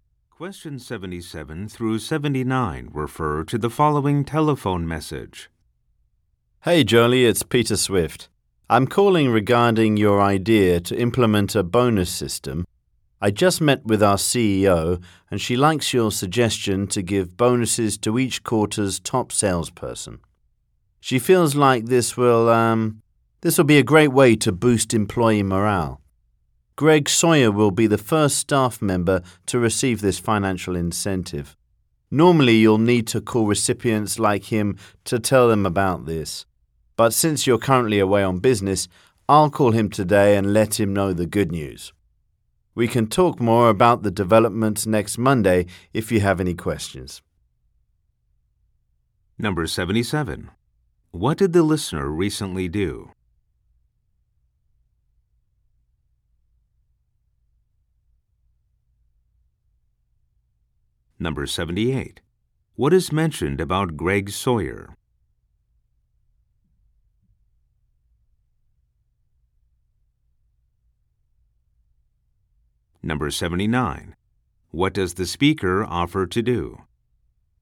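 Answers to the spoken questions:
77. Suggested a bonus system
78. He will be the first to get the bonus
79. Call Greg Sawyer to tell him the news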